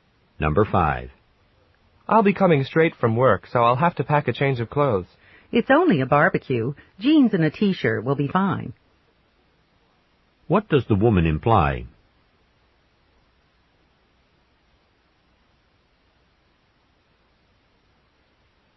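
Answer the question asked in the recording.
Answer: The man doesn't need to dress up; jeans and a t-shirt will be fine for the barbecue.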